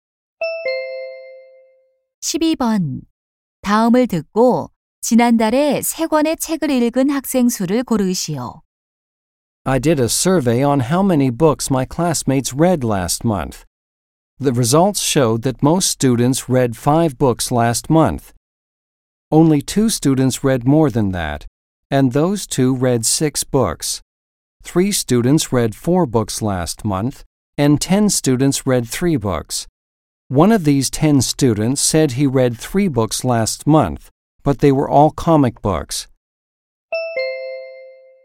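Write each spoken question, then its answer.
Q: 다음을 듣고 지난달에 세 권의 책을 읽은 학생 수를 고르시오.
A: 10명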